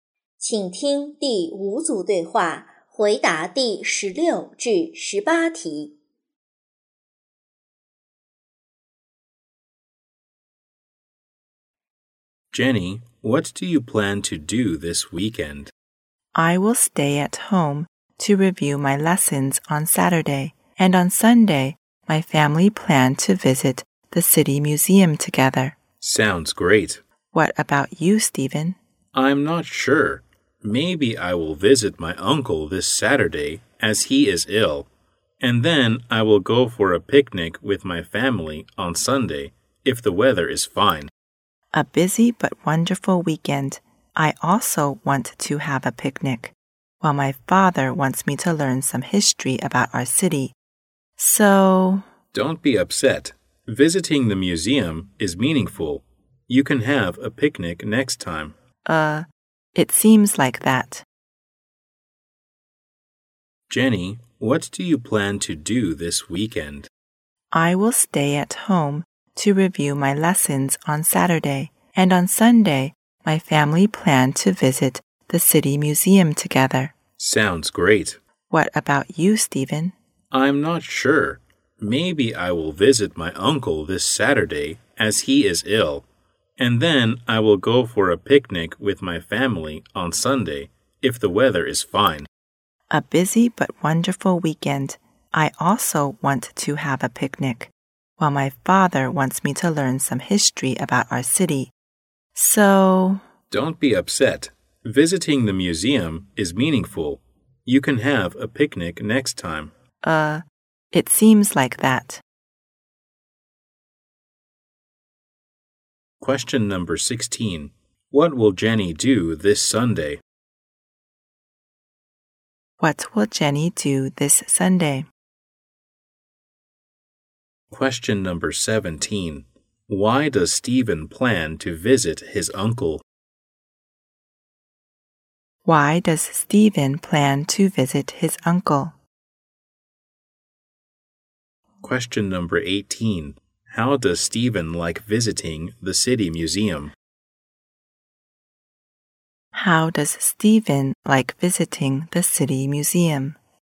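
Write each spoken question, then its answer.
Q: What will Jenny do this Sunday?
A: Visit the City Museum with her family

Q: Why does Stephen plan to visit his uncle?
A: Because his uncle is ill

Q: How does Stephen like visiting the City Museum?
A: He thinks it is meaningful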